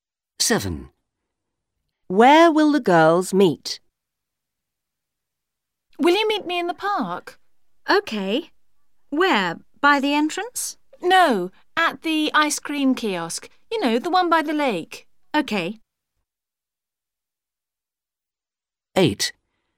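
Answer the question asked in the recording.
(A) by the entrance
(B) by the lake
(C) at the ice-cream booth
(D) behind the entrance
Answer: (C) at the ice-cream booth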